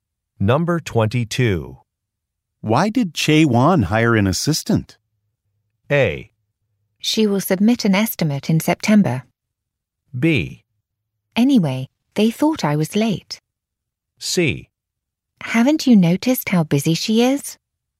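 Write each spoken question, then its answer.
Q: Why did Che Wan hire an assistant?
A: C: Haven't you noticed how busy she is?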